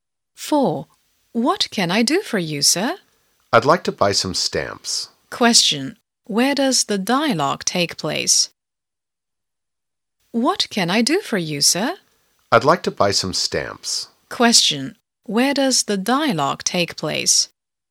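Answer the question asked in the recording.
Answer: At a post office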